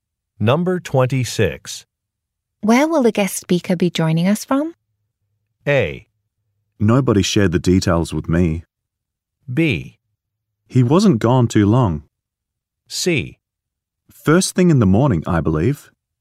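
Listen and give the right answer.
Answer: A: Nobody shared the details with me.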